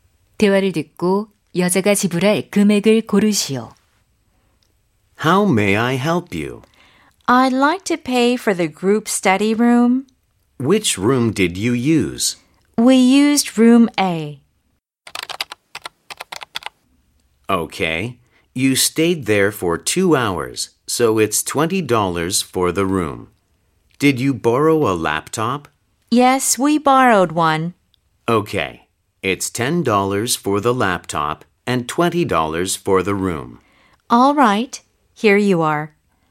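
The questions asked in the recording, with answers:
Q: 16번 대화를 듣고 여자가 지불할 금액을 고르시오.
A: 30달러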